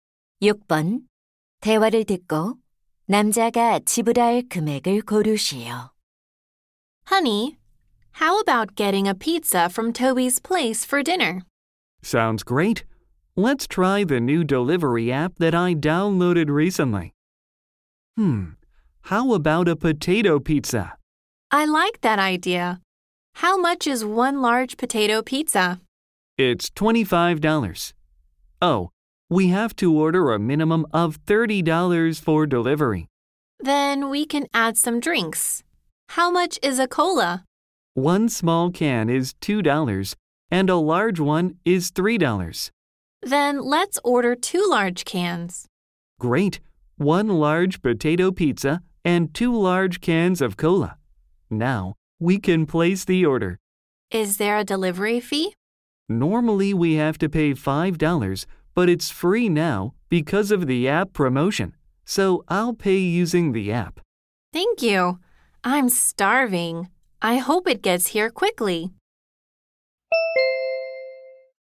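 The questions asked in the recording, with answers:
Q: 대화를 듣고 남자가 지불할 금액을 고르시오.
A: $31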